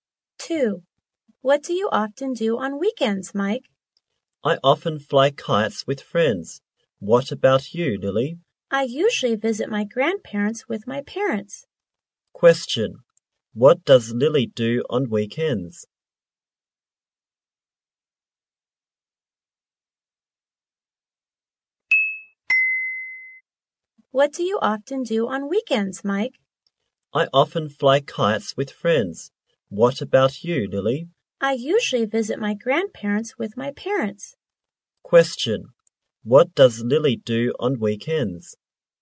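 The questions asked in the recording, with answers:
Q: What does Lily do on weekends?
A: She usually visits her grandparents with her parents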